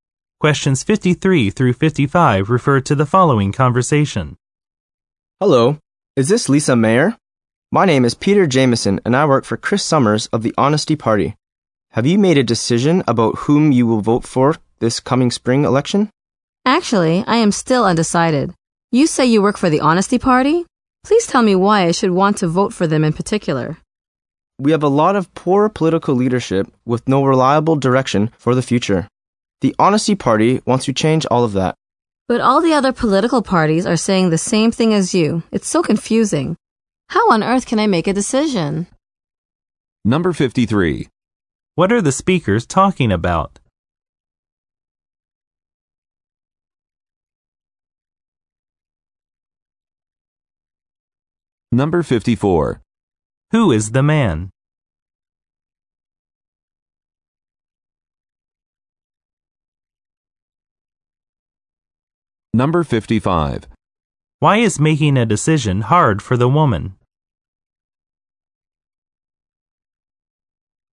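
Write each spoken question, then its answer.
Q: What are the speakers talking about?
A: The coming spring election

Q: Who is the man?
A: A worker for Chris Summers of the Honesty Party

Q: Why is making a decision hard for the woman?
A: All the parties are saying the same thing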